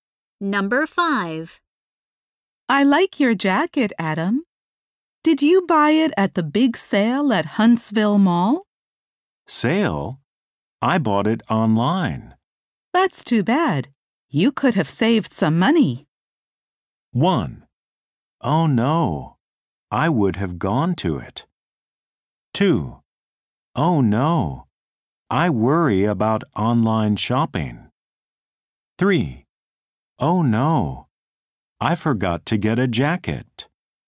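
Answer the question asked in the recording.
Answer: 1: Oh no, I would have gone to it.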